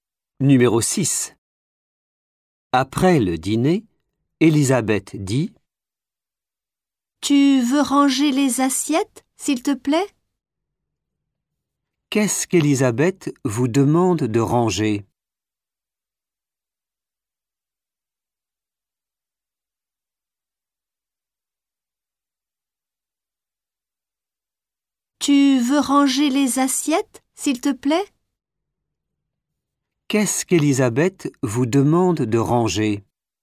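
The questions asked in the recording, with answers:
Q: Qu'est-ce qu'Elisabeth vous demande de ranger ?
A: Les assiettes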